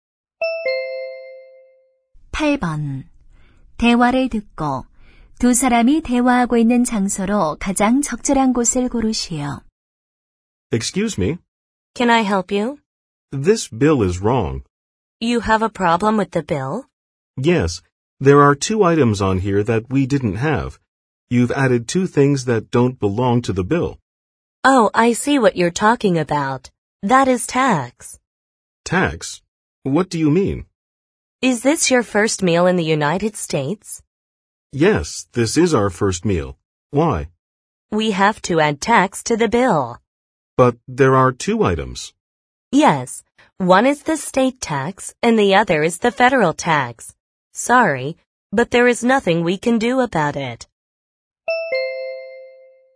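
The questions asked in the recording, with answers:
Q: 대화를 듣고 두 사람이 대화하고 있는 장소로 가장 적절한 곳을 고르시오.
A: 식당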